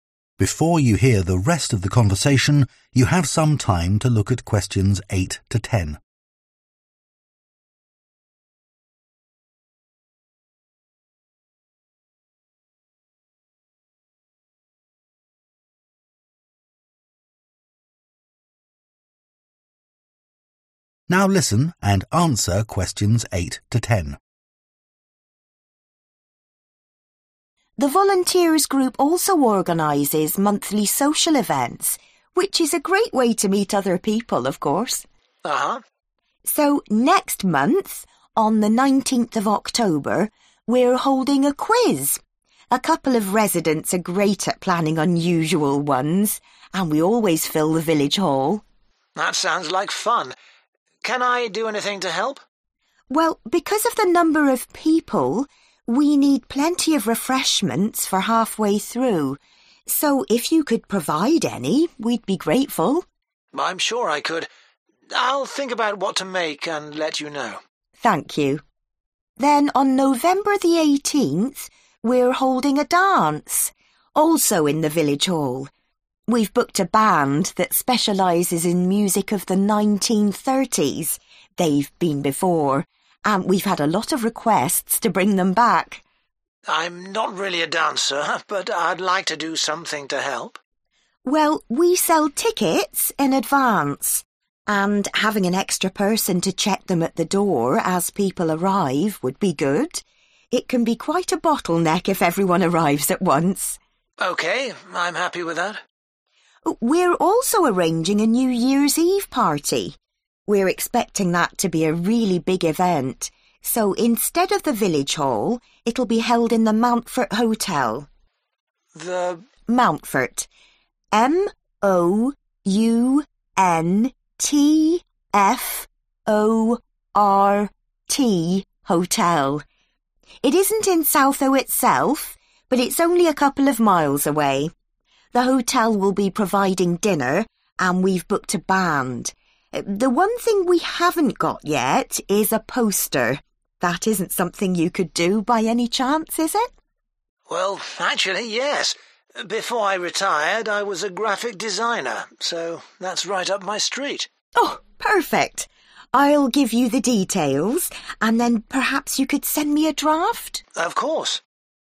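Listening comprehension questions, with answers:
Complete the table below. Write ONE WORD ONLY for each answer.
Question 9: checking 9 ..................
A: tickets

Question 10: designing the 10 ..................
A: poster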